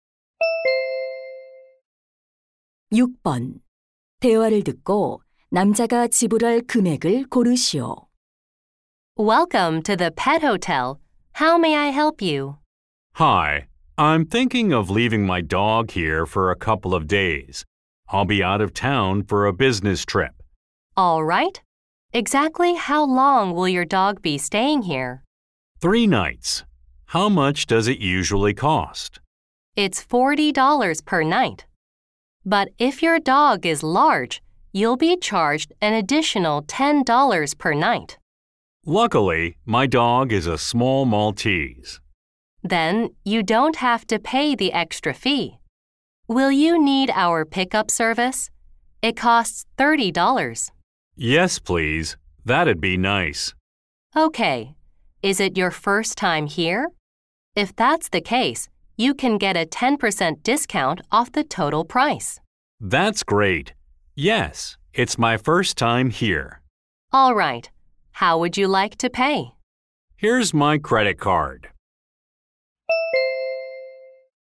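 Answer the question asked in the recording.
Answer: $135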